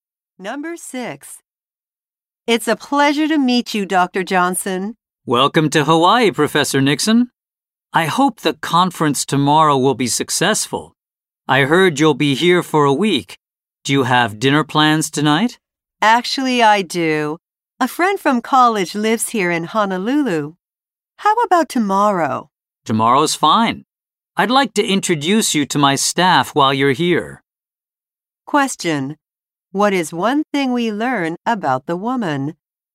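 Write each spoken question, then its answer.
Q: What is one thing we learn about the woman?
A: She has dinner plans tonight with a college friend in Honolulu.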